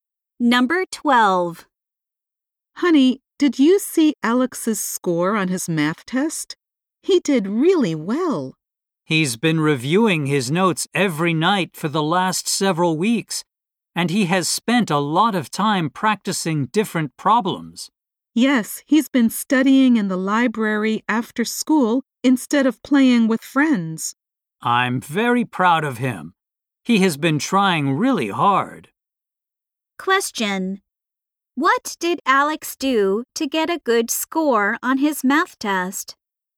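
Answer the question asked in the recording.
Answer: He reviewed his notes and practiced problems every night.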